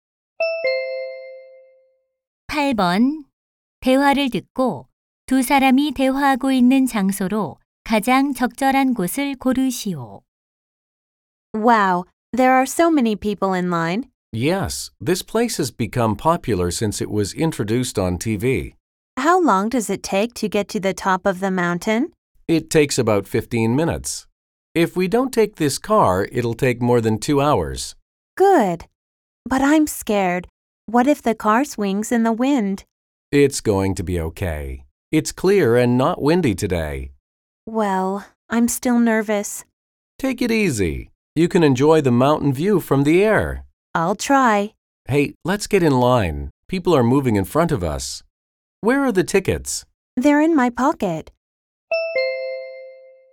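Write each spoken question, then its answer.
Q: 대화를 듣고 두 사람이 대화하고 있는 장소로 가장 적절한 곳을 고르시오.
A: 케이블카 탑승장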